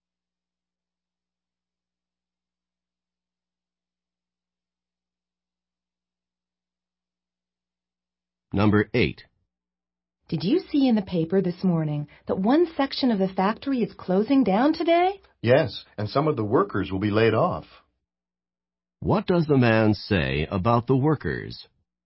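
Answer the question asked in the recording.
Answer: Some will lose their jobs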